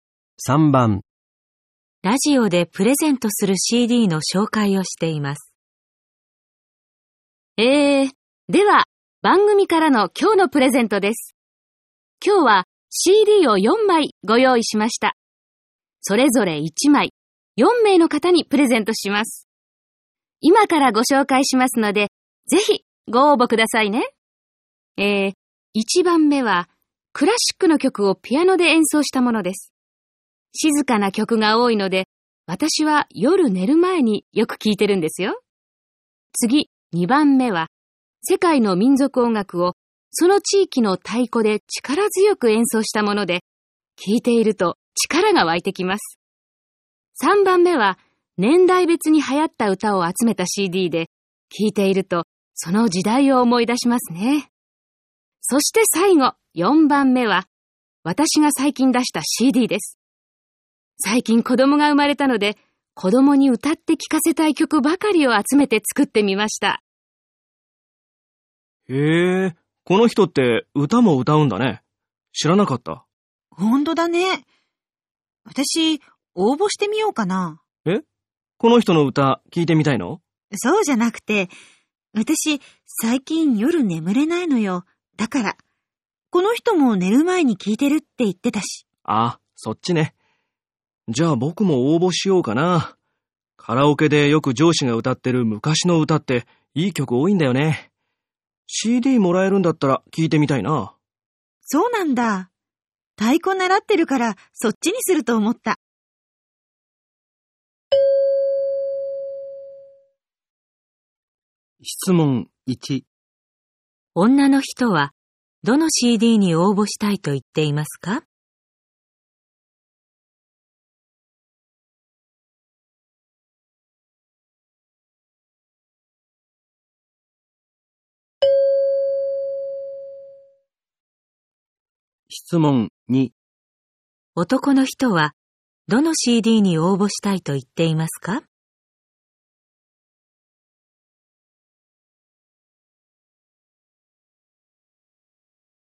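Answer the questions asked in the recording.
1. 1番目のクラシックのピアノのCD
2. 3番目の年代別に流行った歌のCD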